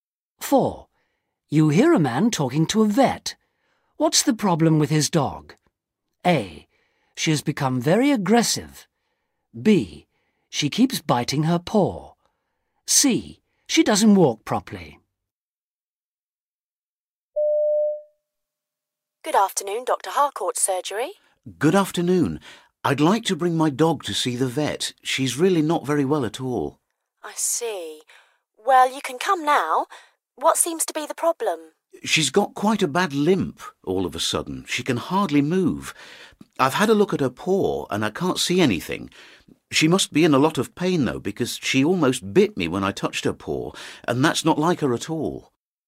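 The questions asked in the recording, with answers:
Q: What's the problem with his dog?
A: C: She doesn't walk properly.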